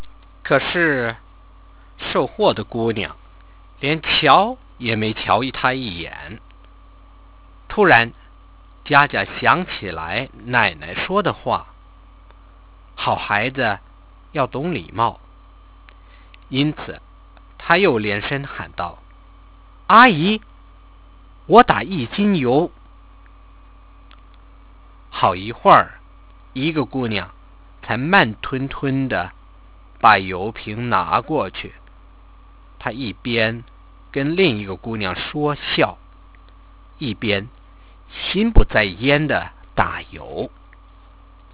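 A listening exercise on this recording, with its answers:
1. What was Jiajia going to buy in the shop?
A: Half a kilogram (one jin) of cooking oil

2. What were the shop assistants doing when Jiajia talked to them?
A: Chatting and laughing with each other and ignoring her

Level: 2nd year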